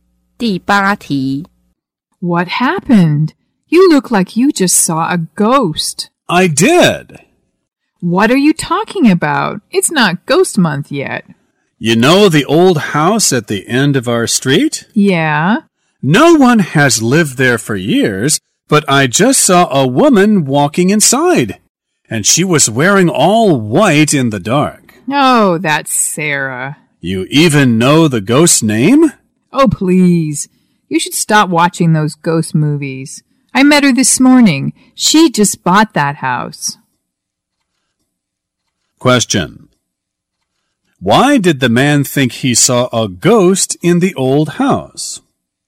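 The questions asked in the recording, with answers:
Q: Why did the man think he saw a ghost in the old house?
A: He saw a woman in white walking in a house no one had lived in for years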